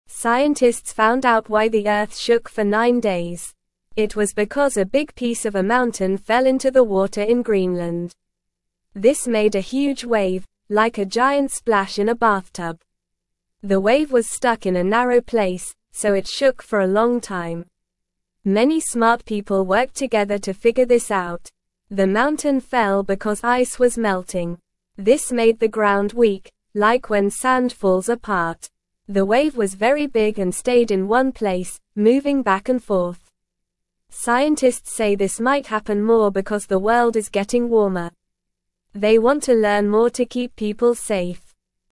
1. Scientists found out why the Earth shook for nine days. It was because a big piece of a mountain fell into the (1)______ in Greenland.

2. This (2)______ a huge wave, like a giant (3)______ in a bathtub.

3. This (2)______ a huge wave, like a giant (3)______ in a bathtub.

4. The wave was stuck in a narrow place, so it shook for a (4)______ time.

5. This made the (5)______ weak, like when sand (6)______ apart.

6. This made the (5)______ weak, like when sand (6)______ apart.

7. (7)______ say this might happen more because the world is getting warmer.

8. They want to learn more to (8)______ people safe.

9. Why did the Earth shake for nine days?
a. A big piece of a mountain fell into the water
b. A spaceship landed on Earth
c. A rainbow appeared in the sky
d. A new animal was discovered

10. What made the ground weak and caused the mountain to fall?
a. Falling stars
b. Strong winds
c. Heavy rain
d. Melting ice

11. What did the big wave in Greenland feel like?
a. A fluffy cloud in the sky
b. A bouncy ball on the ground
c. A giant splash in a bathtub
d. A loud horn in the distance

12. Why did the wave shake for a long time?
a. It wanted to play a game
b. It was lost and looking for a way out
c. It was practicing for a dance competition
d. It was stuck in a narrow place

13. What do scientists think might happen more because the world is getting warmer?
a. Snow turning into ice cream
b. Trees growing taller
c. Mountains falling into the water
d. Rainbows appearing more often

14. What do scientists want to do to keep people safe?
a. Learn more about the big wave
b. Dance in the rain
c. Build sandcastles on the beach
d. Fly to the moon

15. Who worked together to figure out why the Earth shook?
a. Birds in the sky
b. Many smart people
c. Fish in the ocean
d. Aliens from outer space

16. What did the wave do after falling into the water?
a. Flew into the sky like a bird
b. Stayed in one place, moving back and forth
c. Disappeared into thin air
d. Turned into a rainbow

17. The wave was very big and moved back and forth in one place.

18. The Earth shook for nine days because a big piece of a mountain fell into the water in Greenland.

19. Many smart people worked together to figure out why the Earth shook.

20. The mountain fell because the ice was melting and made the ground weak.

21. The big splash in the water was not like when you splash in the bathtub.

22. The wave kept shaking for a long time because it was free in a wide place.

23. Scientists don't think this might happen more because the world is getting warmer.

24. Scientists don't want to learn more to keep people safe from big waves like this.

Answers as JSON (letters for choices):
{"1": "water", "2": "made", "3": "splash", "4": "long", "5": "ground", "6": "falls", "7": "Scientists", "8": "keep", "9": "a", "10": "d", "11": "c", "12": "d", "13": "c", "14": "a", "15": "b", "16": "b", "17": "True", "18": "True", "19": "True", "20": "True", "21": "False", "22": "False", "23": "False", "24": "False"}

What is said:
Scientists found out why the Earth shook for nine days. It was because a big piece of a mountain fell into the water in Greenland. This made a huge wave, like a giant splash in a bathtub. The wave was stuck in a narrow place, so it shook for a long time. Many smart people worked together to figure this out.
The mountain fell because ice was melting. This made the ground weak, like when sand falls apart. The wave was very big and stayed in one place, moving back and forth. Scientists say this might happen more because the world is getting warmer. They want to learn more to keep people safe.

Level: Level 1